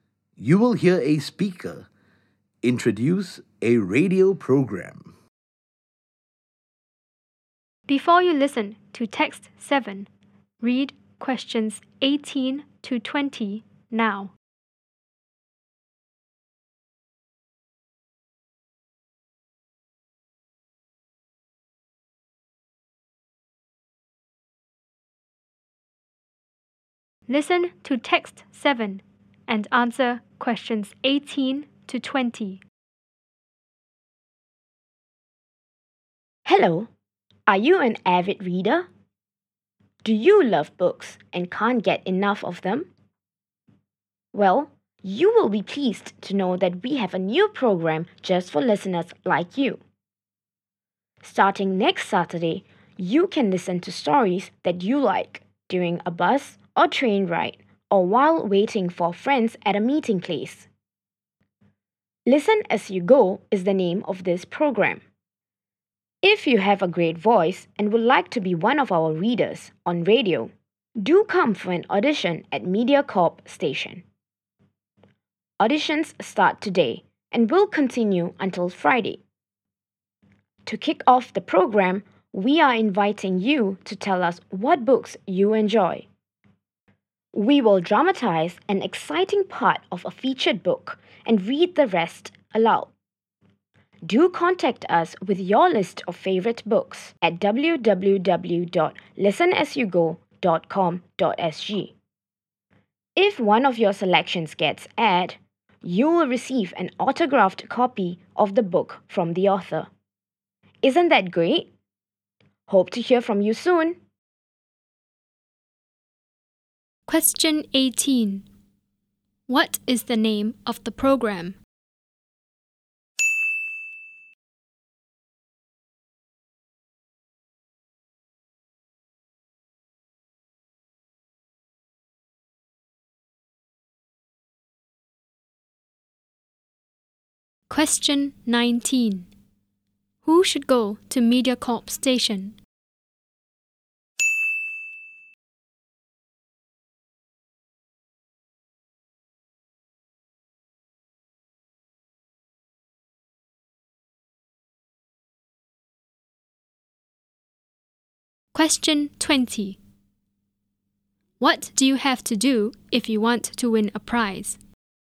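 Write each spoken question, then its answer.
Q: What is the name of the program?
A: Listen As You Go

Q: Who should go to MediaCorp Station?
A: People with a great voice who want to be readers on the radio (for an audition)

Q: What do you have to do if you want to win a prize?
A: Send your list of favorite books via the website; if a selection is aired you get an autographed copy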